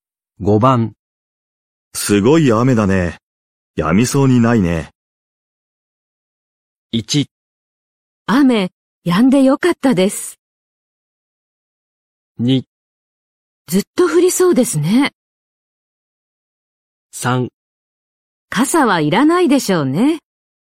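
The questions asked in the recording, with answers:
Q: すごい雨だね。やみそうにないね。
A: 2: ずっと降りそうですね。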